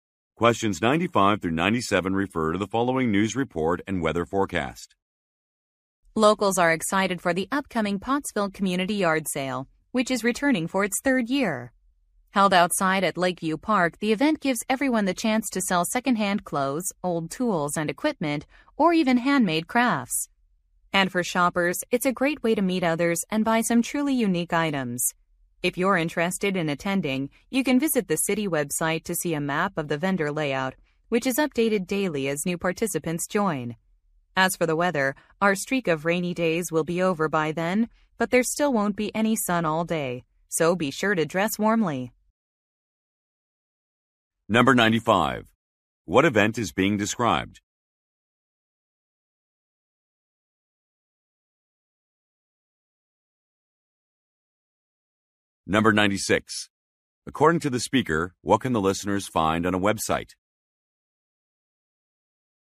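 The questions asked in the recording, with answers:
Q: What event is being described?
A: A community yard sale

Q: According to the speaker, what can the listeners find on a website?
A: A map of the vendor layout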